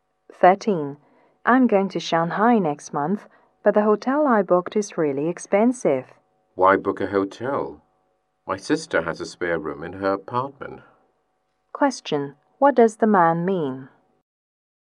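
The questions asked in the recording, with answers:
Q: What does the man mean?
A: The woman can stay in his sister's apartment instead of a hotel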